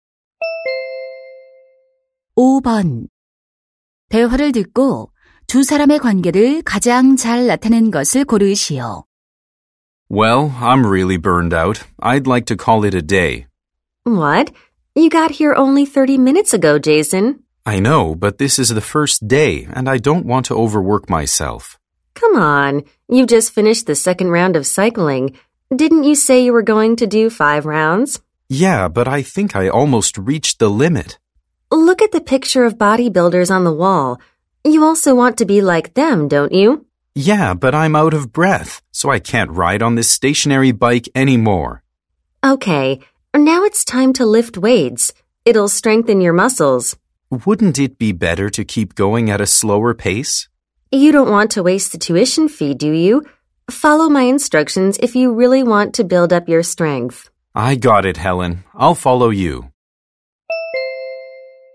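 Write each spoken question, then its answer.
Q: 대화를 듣고 두 사람의 관계를 가장 잘 나타낸 것을 고르시오.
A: 헬스 트레이너 - 회원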